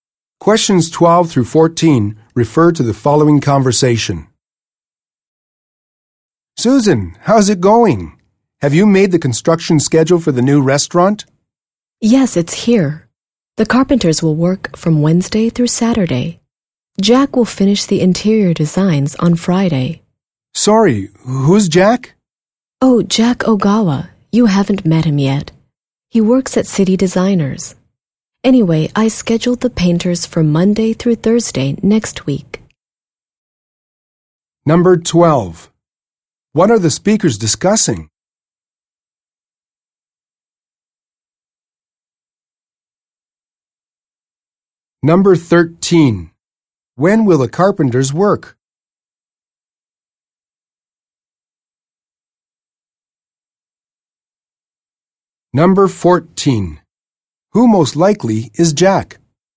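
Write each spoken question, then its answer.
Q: What are the speakers discussing?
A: The construction schedule for the new restaurant

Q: When will the carpenters work?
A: Wednesday through Saturday

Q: Who most likely is Jack?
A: An interior designer at City Designers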